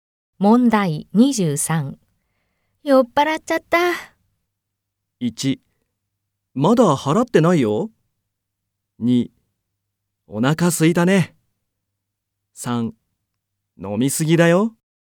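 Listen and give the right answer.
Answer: 3: 飲みすぎだよ。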